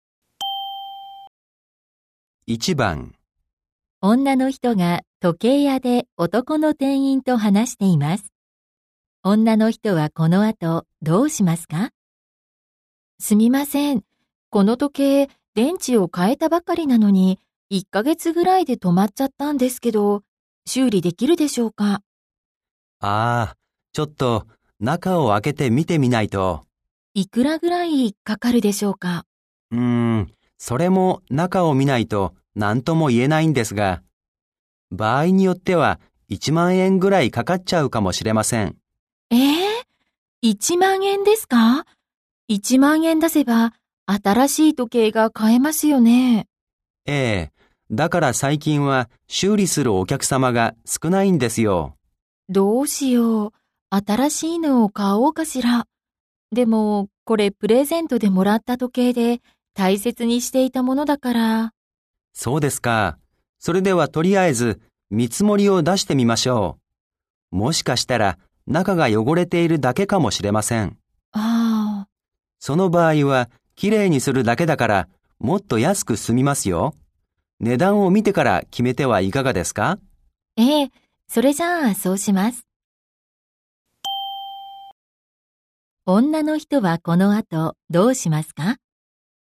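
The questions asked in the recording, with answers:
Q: 女の人はこの後どうしますか?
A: 時計の修理の見積もりを出してもらい、値段を見てから決める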